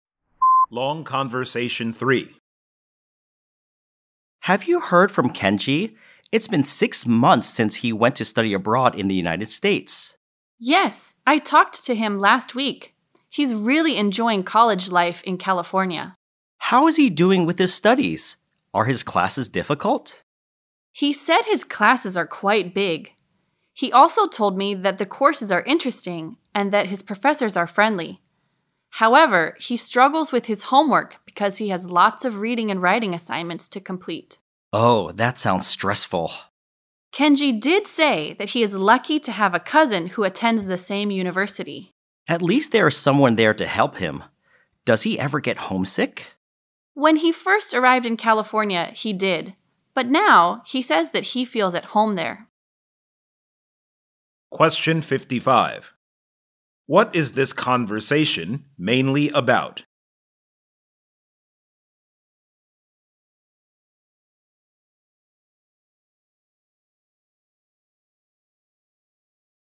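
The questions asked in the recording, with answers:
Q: What is this conversation mainly about?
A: Kenji's college life studying abroad in California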